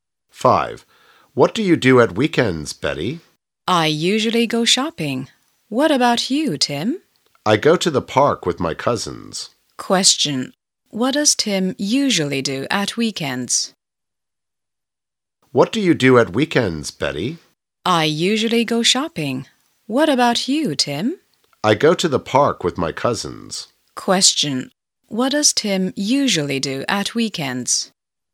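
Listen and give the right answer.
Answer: He goes to the park with his cousins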